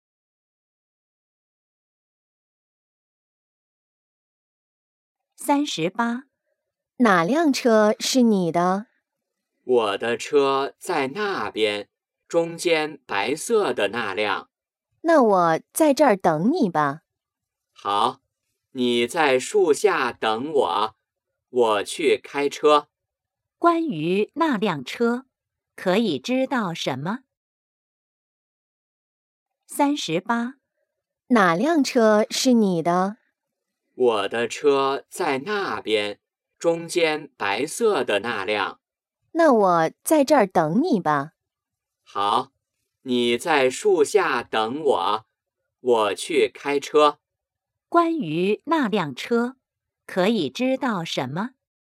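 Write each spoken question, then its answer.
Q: 关于那辆车,可以知道什么?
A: 是白色的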